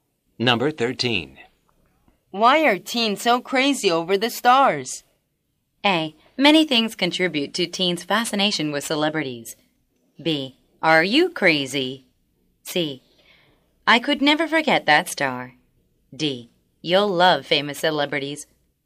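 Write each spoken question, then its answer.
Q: Why are teens so crazy over the stars?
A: A: Many things contribute to teens' fascination with celebrities.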